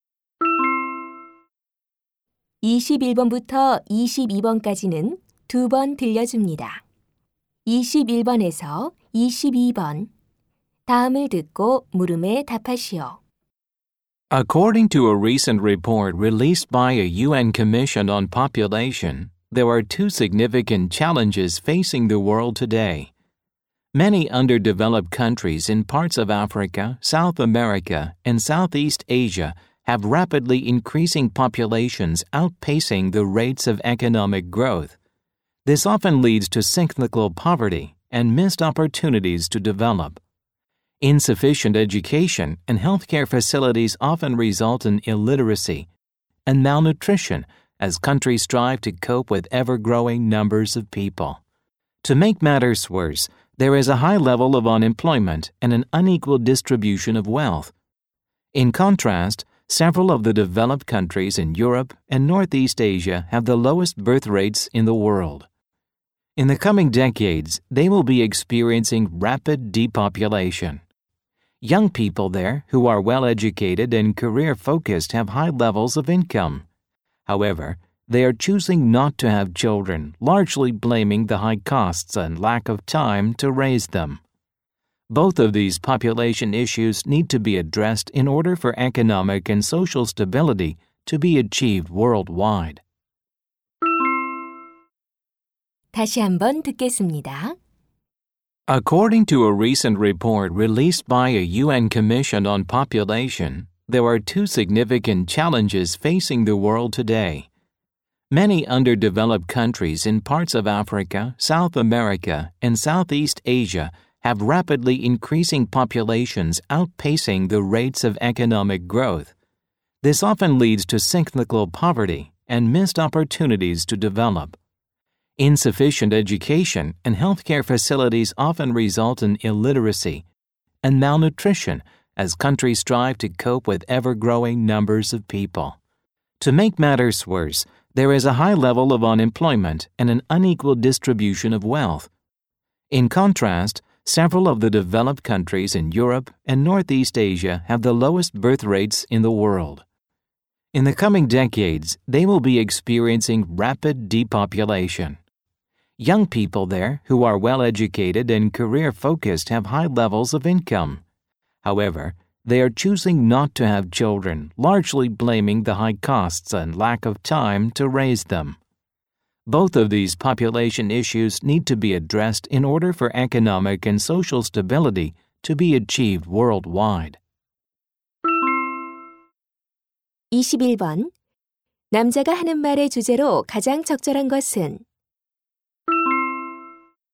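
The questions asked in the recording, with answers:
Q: 남자가 하는 말의 주제로 가장 적절한 것은?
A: 세계가 직면한 두 가지 인구 문제(저개발국 인구 급증과 선진국 저출산)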